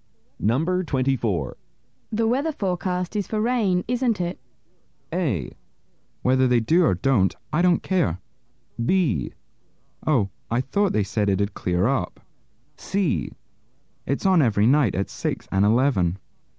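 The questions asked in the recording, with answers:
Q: The weather forecast is for rain, isn't it?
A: B: Oh, I thought they said it'd clear up.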